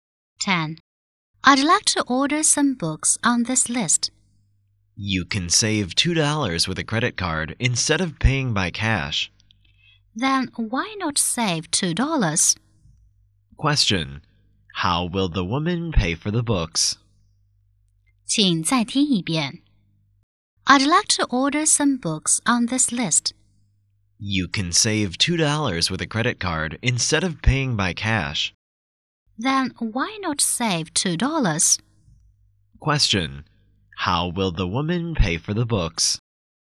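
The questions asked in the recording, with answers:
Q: How will the woman pay for the books?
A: By credit card.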